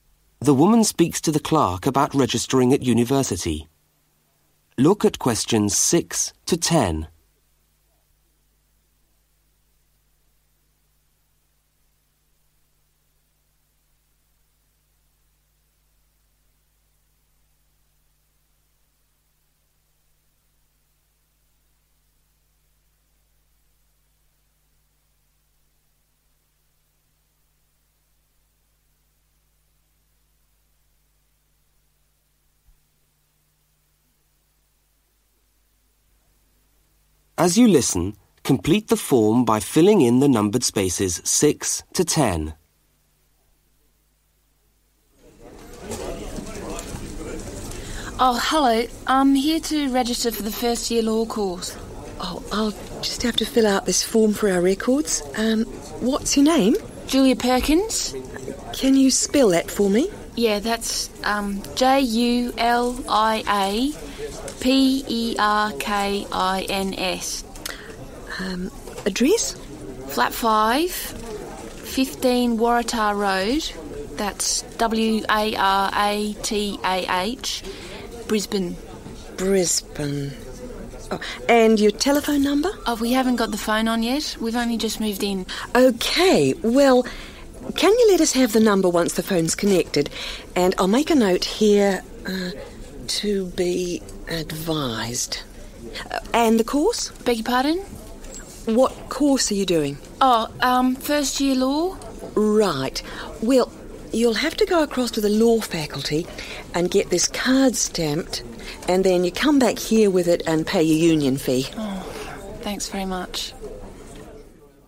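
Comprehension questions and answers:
Complete the registration form using NO MORE THAN THREE WORDS.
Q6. Name of student: (6) .............................................................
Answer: Julia Perkins

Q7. Address: (7) Flat 5/ ................................................................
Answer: 15 Waratah Road

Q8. Town: (8) .................................................................................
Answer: Brisbane

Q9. Tel: (9) .....................................................................................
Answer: to be advised

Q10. Course: (10) ...........................................................................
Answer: first year law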